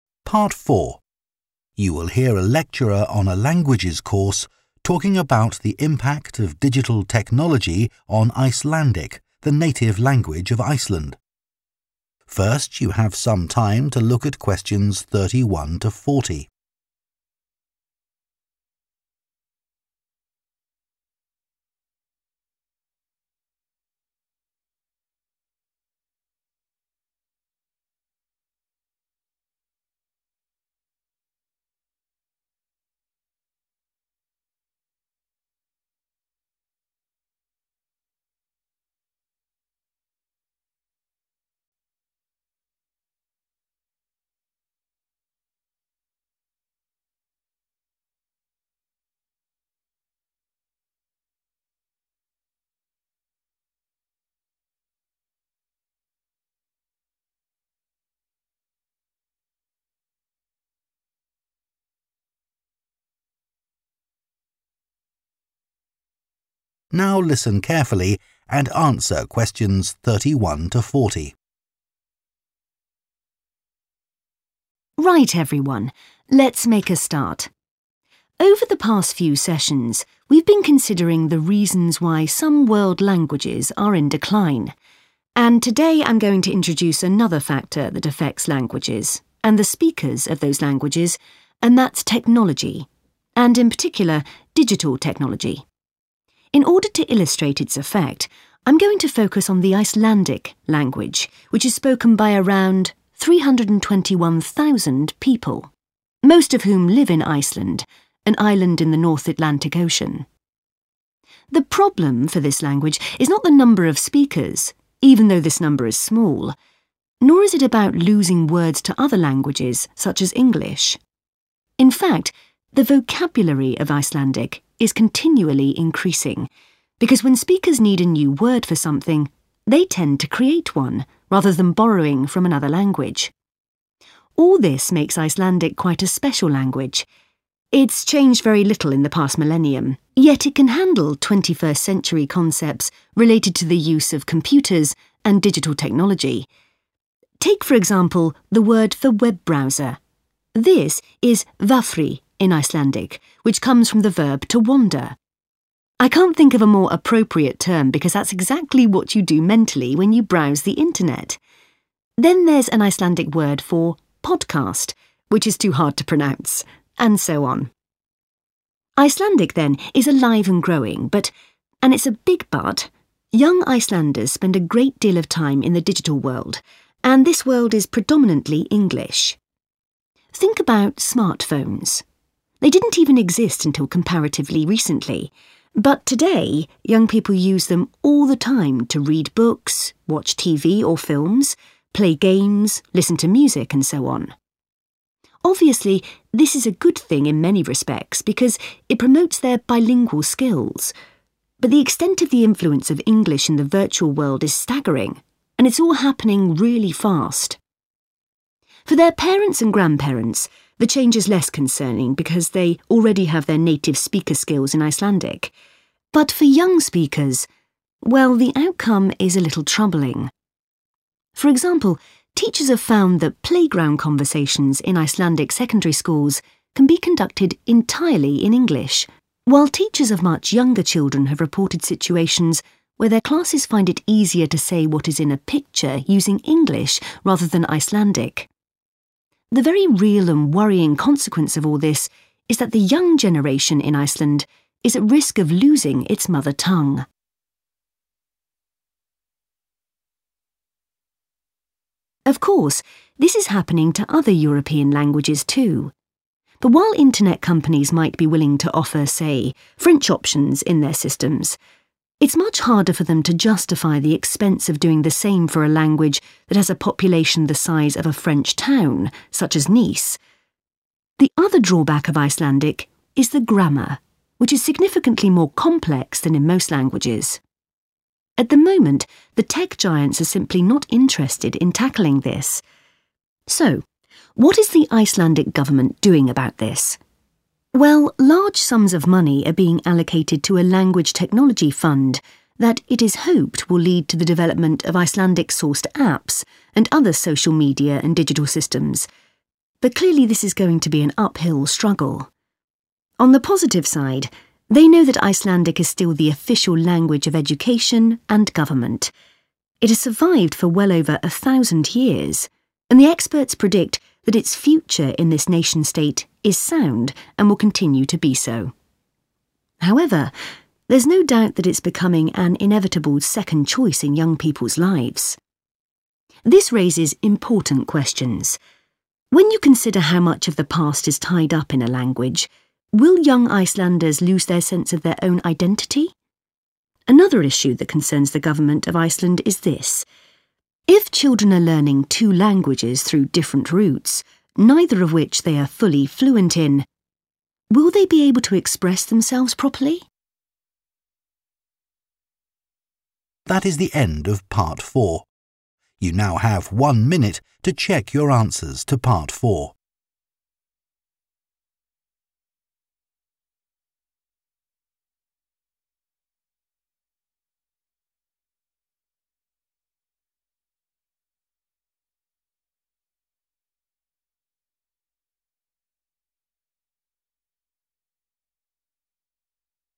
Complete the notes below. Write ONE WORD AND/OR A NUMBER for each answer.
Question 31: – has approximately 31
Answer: 321,000

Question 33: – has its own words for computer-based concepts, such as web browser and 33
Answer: podcast

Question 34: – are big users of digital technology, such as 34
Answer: smartphones

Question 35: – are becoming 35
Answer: bilingual

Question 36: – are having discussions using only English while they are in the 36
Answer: playground

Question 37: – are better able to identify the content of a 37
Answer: picture

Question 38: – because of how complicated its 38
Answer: grammar

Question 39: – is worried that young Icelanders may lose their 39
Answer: identity

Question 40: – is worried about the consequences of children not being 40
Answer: fluent

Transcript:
Right, everyone, let's make a start. Over the past few sessions, we've been considering the reasons why some world languages are in decline, and today I'm going to introduce another factor that affects [=impact] languages, and the speakers of those languages, and that's technology and, in particular, digital technology. In order to illustrate its effect, I'm going to focus on the Icelandic language, which is spoken by around 321,000 people [Tôi sẽ tập trung vào tiếng Iceland, ngôn ngữ có khoảng 321.000 người nói] (Question 31), most of whom live in Iceland – an island in the North Atlantic Ocean.
The problem for this language is not the number of speakers – even though this number is small. Nor is it about losing words to other languages, such as English. In fact, the vocabulary of Icelandic is continually increasing [vốn từ vựng của tiếng Iceland liên tục tăng lên] (Question 32) because when speakers need a new word for something, they tend to create one, rather than borrowing from another language. All this makes Icelandic quite a special language – it's changed very little in the past millennium, yet it can handle twenty-first-century concepts related to the use of computers and digital technology. Take, for example [=such as], the word for web browser ... this is "vafri" in Icelandic, which comes from the verb 'to wander' [Lấy ví dụ, từ cho trình duyệt web... I can't think of a more appropriate term because that's exactly what you do mentally when you browse the internet. Then there's an Icelandic word for podcast [Tiếp đó, có một từ tiếng Iceland cho podcast] (Question 33) – which is too hard to pronounce! And so on.
Icelandic, then, is alive and growing, but – and it's a big but – young Icelanders spend a great deal of time in the digital world and this world is predominantly English. Think about smartphones. They didn't even exist until comparatively recently, but today young people use them all the time [=big users] [Hãy nghĩ về điện thoại thông minh.
For their parents and grandparents, the change is less concerning because they already have their native-speaker skills in Icelandic. But for young speakers – well, the outcome is a little troubling. The very real and worrying consequence of all this is that the young generation in Iceland is at risk of losing its mother tongue.
Of course, this is happening to other European languages too, but while internet companies might be willing to offer, say, French options in their systems, it's much harder for them to justify the expense of doing the same for a language that has a population the size of a French town [=small number of speakers], such as Nice. At the moment, the tech giants are simply not interested in tackling this.
So, what is the Icelandic government doing about this? Well, large sums of money are being allocated to a language technology fund that it is hoped will lead to the development of Icelandic sourced apps and other social media and digital systems, but clearly this is going to be an uphill struggle.
On the positive side, they know that Icelandic is still the official language of education and government. It has survived for well over a thousand years and the experts predict that its future in this nation state is sound and will continue to be so. However, there's no doubt that it's becoming an inevitable second choice in young people's lives.
This raises important questions. When you consider how much of the past is tied up in a language, will young Icelanders lose their sense of their own identity [Liệu những người trẻ tuổi ở Iceland có đánh mất ý thức về bản sắc của chính mình] (Question 39)? Another issue that concerns the government of Iceland is this.